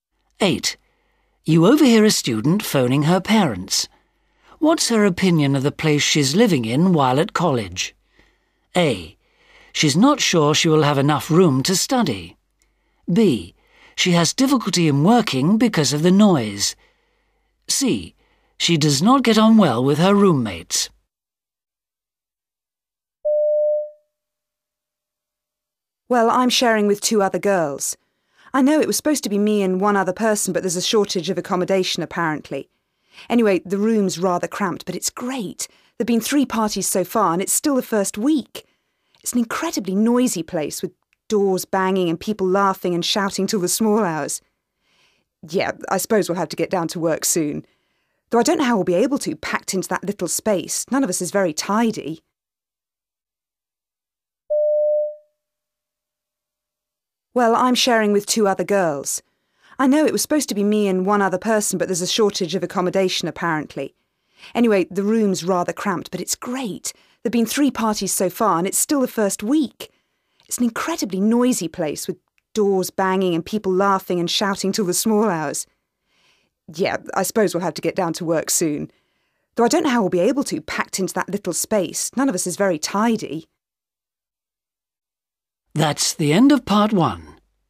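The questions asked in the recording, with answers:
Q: What's her opinion of the place she's living in while at college?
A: A: She's not sure she will have enough room to study.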